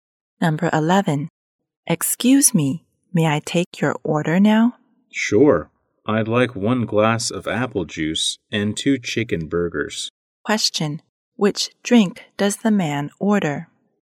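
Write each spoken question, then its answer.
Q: which drink does the man order?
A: Apple juice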